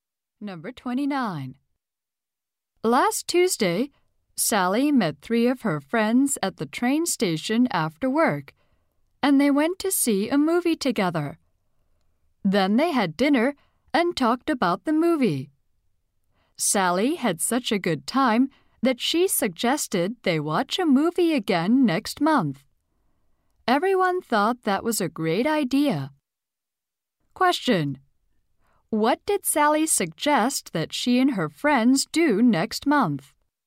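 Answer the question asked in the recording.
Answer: Watch a movie again.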